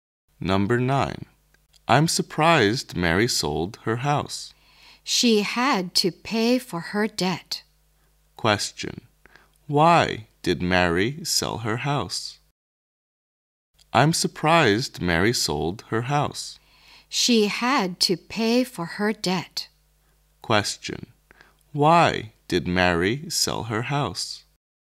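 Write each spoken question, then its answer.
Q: Why did Mary sell her house?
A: To pay her debt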